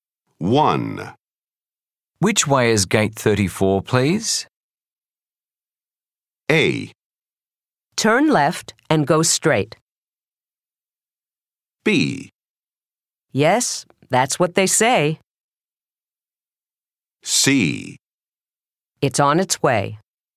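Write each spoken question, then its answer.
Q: Which way is gate 34, please?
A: A: Turn left and go straight.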